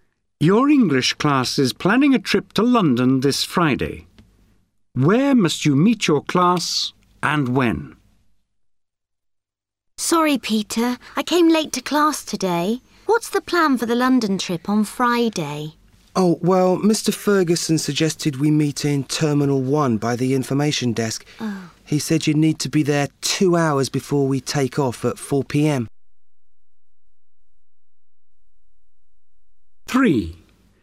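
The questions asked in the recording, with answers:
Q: Where must you meet your class and when?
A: Terminal 1 by the information desk at 2 p.m.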